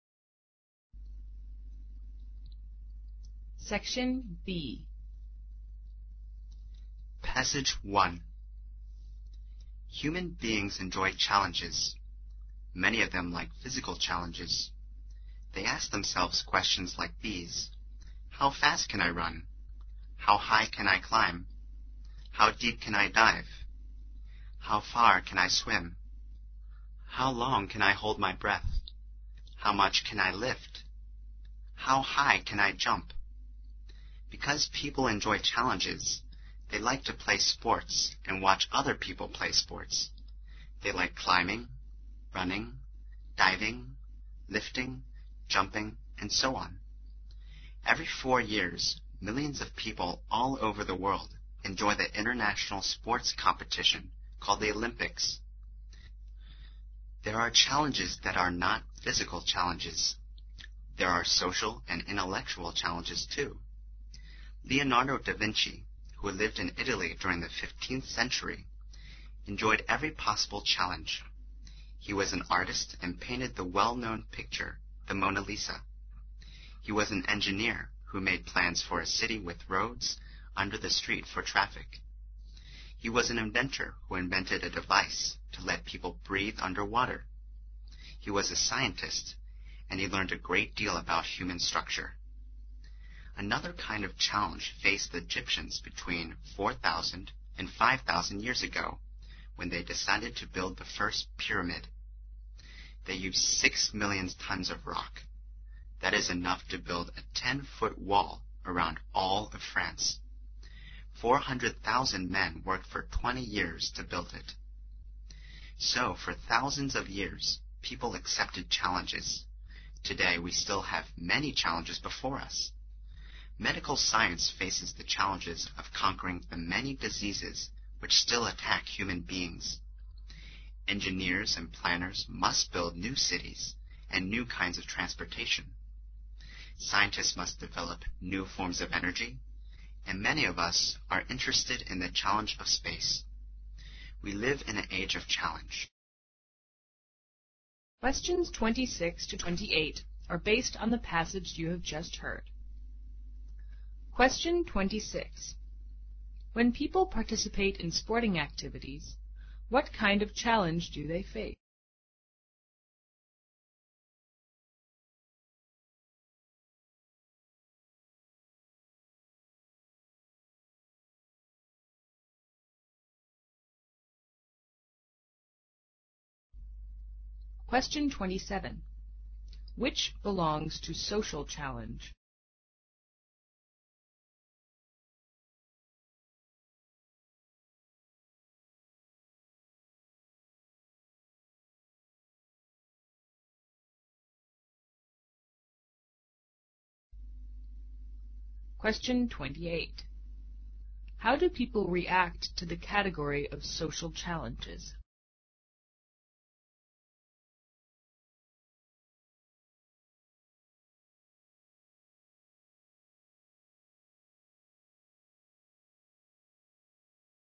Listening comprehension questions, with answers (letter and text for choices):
Questions 26 to 28 are based on the passage you have just heard.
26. When people participate in sporting activities, what kind of challenge do they face?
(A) Social challenge.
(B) Physical challenge.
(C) Economic challenge.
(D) Intellectual challenge.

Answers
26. (B) Physical challenge.

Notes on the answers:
选[B]。预读选项可知此题询问的是challenge的类型。在听的过程中需要留意涉及类型的细节。文中开头的Many of them like physical challenges后用一系列的例子,如How fast I can run?...They like climbing, running...表明,当人们参加体育活动时他们面对的是physical challenges。

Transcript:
Human beings enjoy challenges. Many of them like physical challenges. They ask themselves questions like these: How fast can I run? How high can I climb? How deep can I dive? How far can I swim? How long can I hold my breath? How much can I lift? Because people enjoy challenges, they like to play sports and watch other people play sports. They like climbing, running, diving, lifting, jumping, and so on. Every four years millions of people all over the world enjoy the international sports competition called the Olympics. There are challenges that are not physical challenges. There are social and intellectual challenges, too. Leonardo da Vinci, who lived in Italy during the fifteenth century, enjoyed every possible challenge. He was an artist and painted the well known picture, the Mona Lisa. He was an engineer who made plans for a city with roads under the street for traffic. He was an inventor who invented a device to let people breathe under water. He was a scientist, and he learned a great deal about human structure.
Another kind of challenge faced the Egyptians between 4,000 and 5,000 years ago when they decided to build the first pymp3id. They used six million tons of rock. That is enough to build a ten foot wall around all of France. Four hundred thousand men worked for twenty years to build it.
So, for thousands of years, people accepted challenges. Today we still have many challenges before us. Medical science faces the challenges of conquering the many diseases which still attack human beings. Engineers and planners must build new cities and new kinds of transportation. Scientists must develop new fomp3s of energy. And many of us are interested in the challenge of space. We live in an age of challenge.

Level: 英语四级